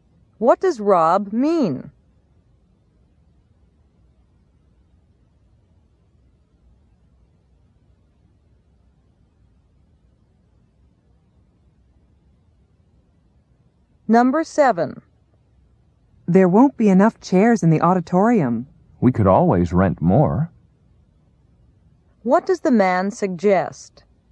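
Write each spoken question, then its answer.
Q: What does the man suggest?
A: Renting more chairs.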